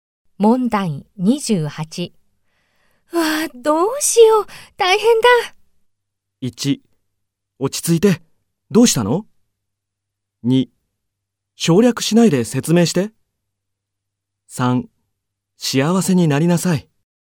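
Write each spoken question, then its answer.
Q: わあ、どうしよう、大変だ。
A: 1: 落ち着いて、どうしたの?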